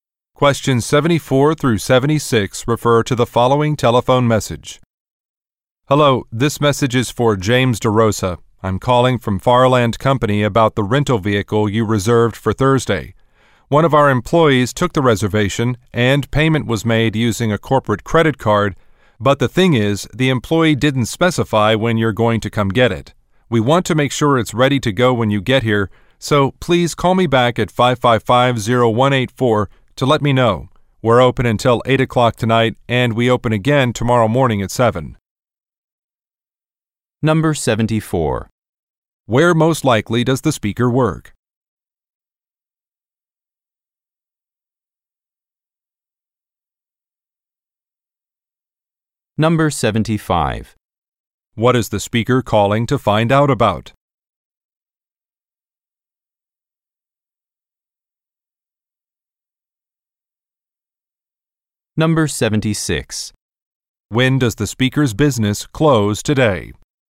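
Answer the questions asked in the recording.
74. At a vehicle rental company
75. When the vehicle will be picked up
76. At 8 o'clock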